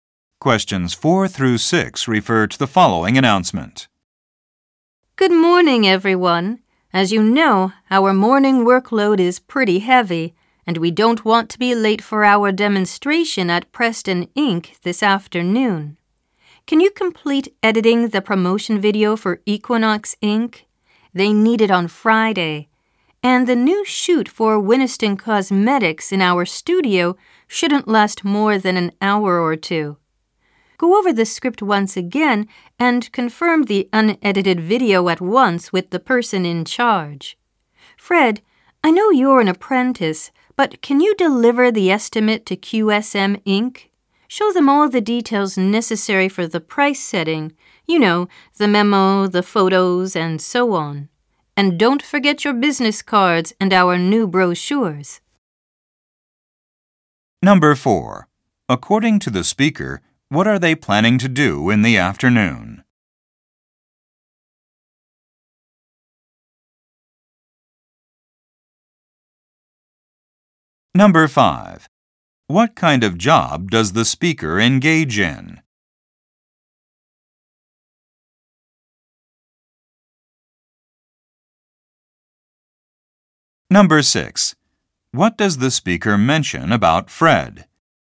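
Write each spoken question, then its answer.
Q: According to the speaker, what are they planning to do in the afternoon?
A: Give a demonstration at Preston Inc.

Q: What kind of job does the speaker engage in?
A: Video production

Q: What does the speaker mention about Fred?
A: He is an apprentice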